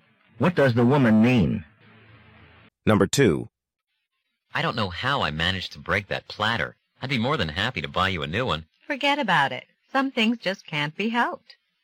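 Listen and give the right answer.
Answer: The man doesn't need to replace the platter; it was an accident.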